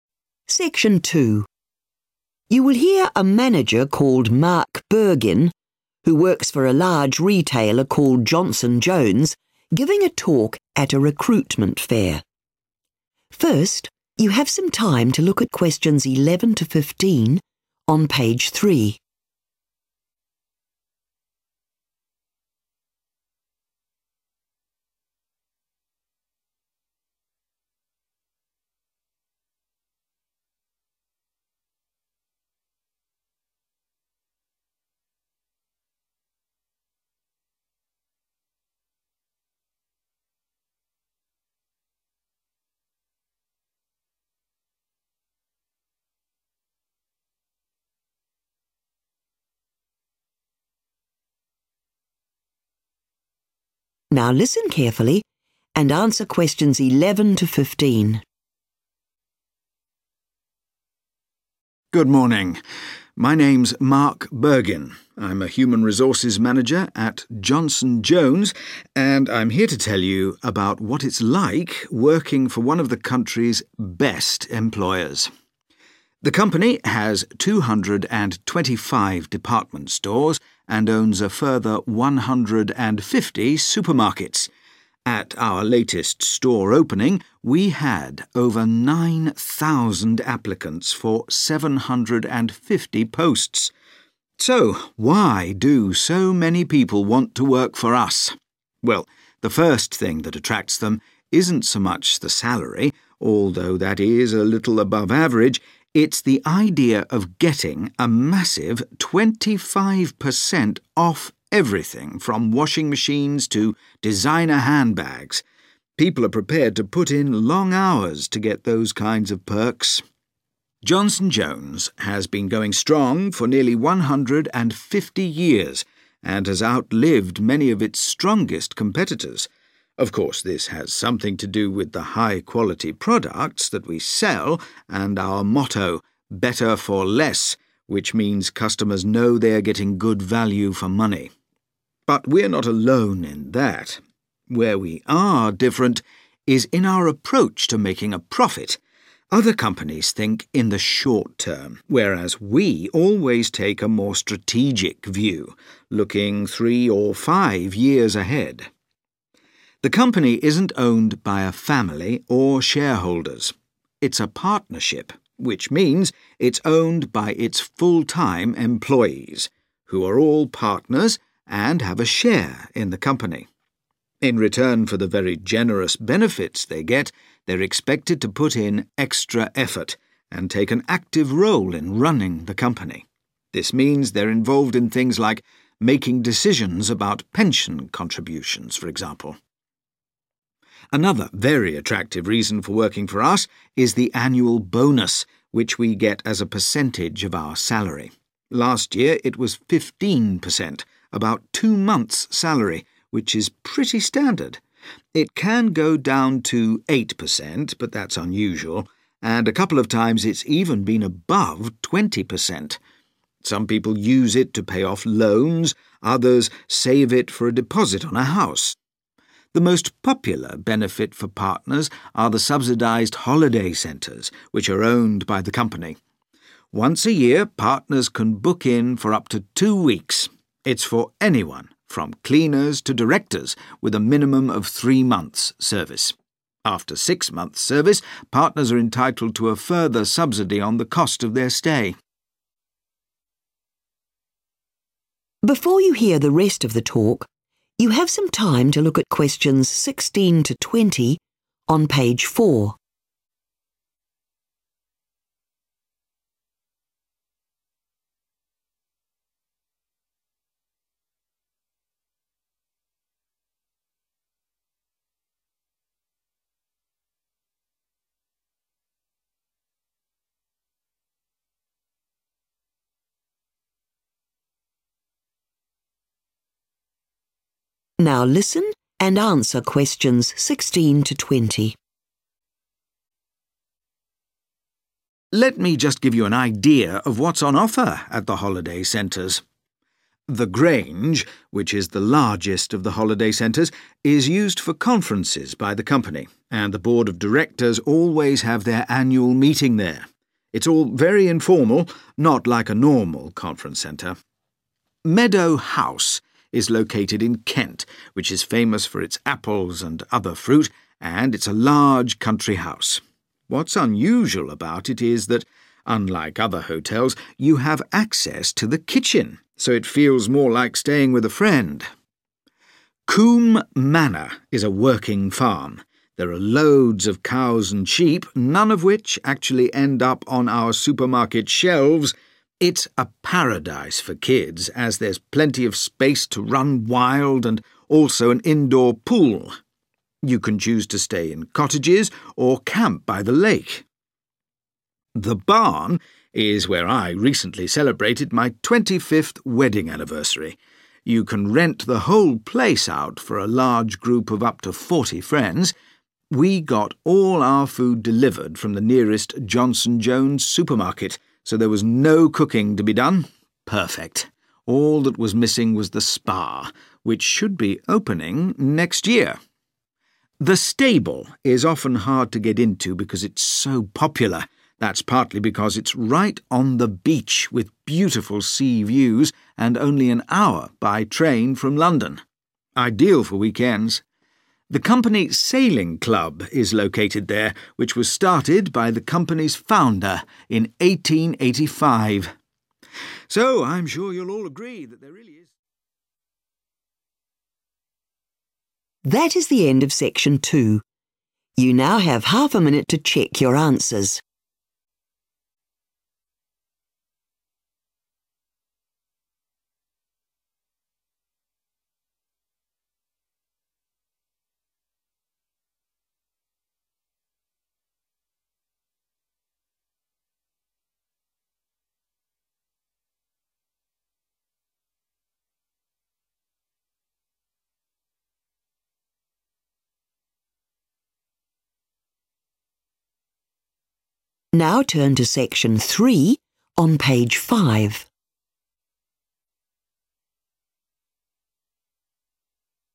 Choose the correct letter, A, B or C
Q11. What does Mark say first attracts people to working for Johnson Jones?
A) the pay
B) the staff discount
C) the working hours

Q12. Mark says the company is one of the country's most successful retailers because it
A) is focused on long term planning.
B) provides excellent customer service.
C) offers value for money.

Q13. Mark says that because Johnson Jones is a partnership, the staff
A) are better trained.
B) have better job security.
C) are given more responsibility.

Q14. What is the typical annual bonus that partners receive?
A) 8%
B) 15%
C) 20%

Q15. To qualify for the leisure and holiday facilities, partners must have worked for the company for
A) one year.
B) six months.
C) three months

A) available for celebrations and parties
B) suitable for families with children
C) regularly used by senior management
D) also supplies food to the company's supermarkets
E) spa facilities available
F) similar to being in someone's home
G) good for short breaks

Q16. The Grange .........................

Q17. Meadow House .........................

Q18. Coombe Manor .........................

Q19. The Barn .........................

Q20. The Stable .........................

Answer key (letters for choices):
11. B
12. A
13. C
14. B
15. C
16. C
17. F
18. B
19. A
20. G